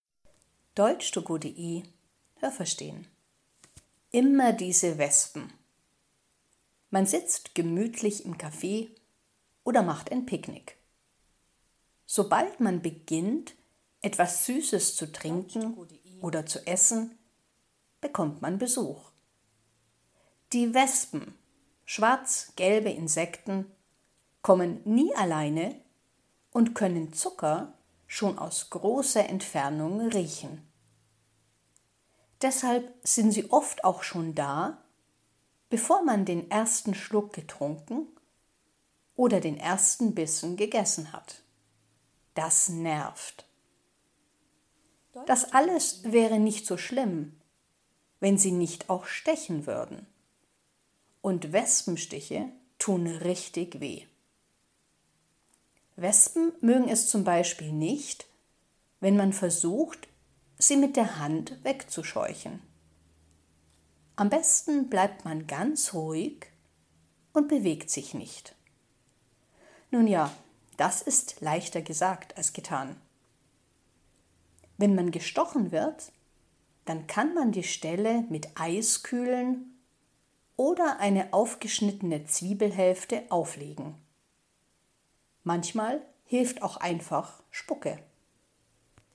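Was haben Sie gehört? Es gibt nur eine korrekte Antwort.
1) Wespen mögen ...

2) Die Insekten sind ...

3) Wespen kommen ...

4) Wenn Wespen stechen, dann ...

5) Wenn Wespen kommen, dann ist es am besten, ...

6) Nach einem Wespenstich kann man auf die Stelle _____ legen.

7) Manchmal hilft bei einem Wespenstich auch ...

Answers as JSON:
{"1": "Süßes / Zucker", "2": "schwarz-gelb", "3": "nie alleine", "4": "tut das richtig weh", "5": "ganz ruhig zu bleiben und sich nicht zu bewegen", "6": "eine aufgeschnittene Zwiebelhälfte", "7": "Spucke"}

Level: A (einfach)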